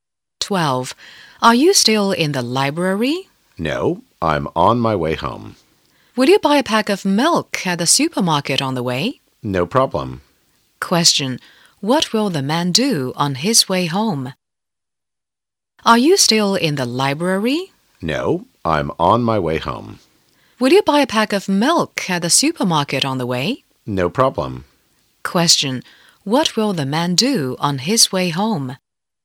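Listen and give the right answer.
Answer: Buy a pack of milk at the supermarket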